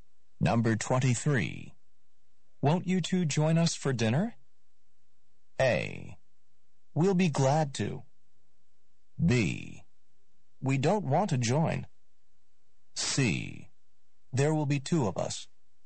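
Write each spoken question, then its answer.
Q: Won't you two join us for dinner?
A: A: We'll be glad to.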